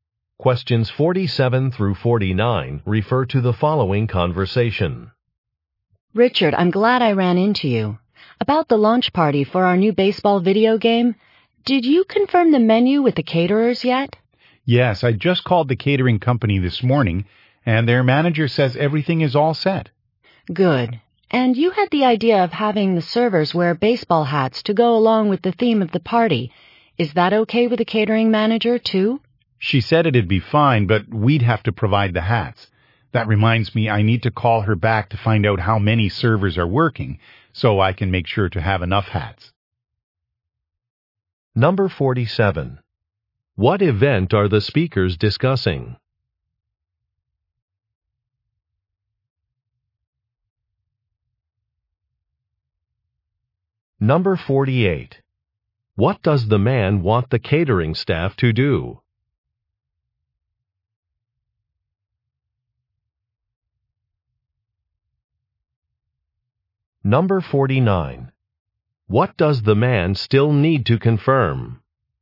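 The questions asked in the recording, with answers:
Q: What event are the speakers discussing?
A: A launch party for a new video game

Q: What does the man want the catering staff to do?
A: Wear baseball hats

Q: What does the man still need to confirm?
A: How many servers are working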